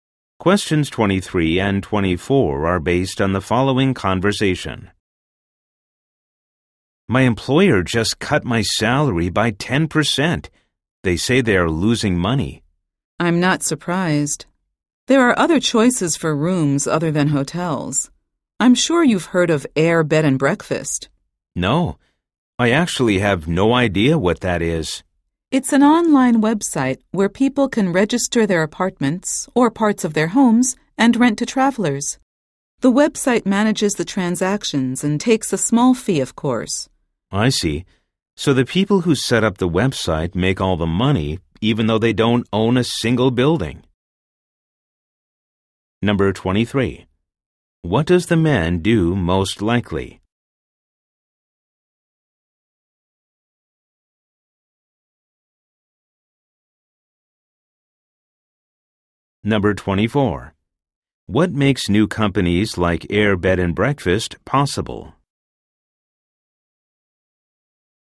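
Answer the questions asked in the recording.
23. He works for a hotel
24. The internet (online websites)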